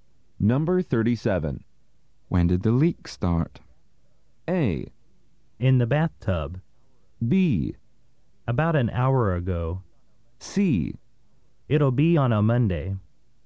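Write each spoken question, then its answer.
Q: When did the leak start?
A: B: About an hour ago.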